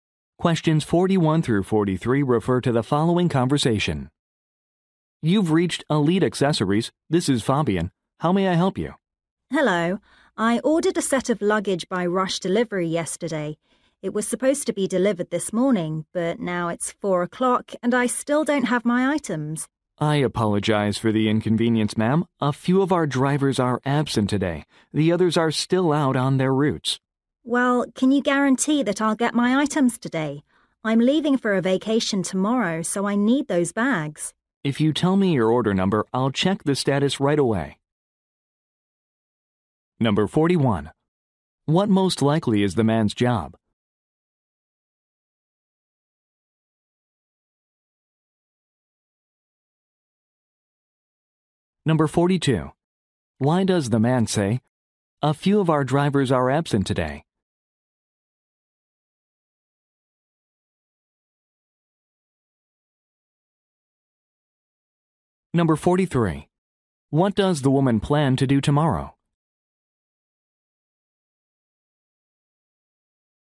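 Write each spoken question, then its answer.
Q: What most likely is the man's job?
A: Customer service representative

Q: Why does the man say, "A few of our drivers are absent today"?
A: To explain the delivery delay

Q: What does the woman plan to do tomorrow?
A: Leave for a vacation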